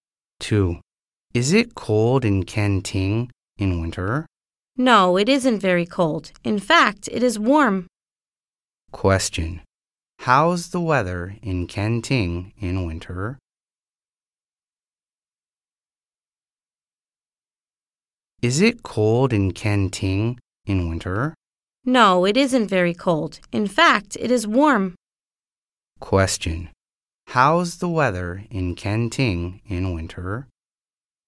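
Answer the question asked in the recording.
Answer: It is warm.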